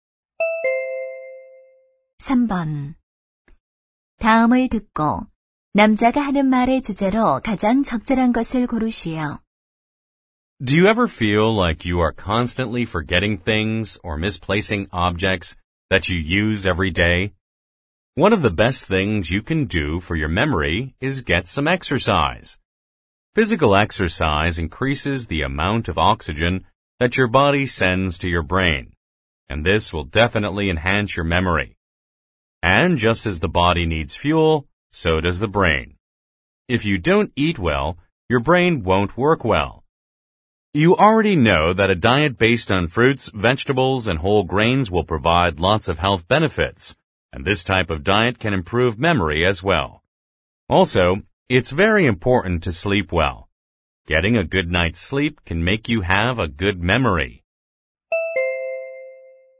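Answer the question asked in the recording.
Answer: 기억력을 향상시키는 방법 (운동, 식사, 수면)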